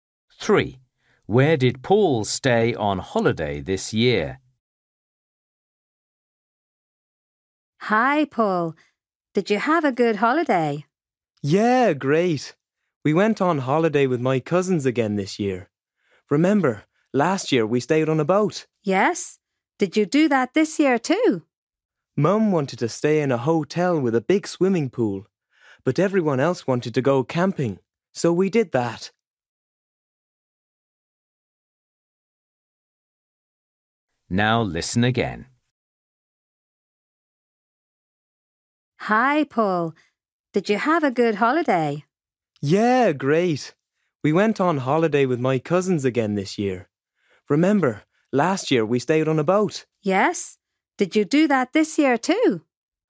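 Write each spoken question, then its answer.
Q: Where did Paul stay on holiday this year?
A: camping (in a tent)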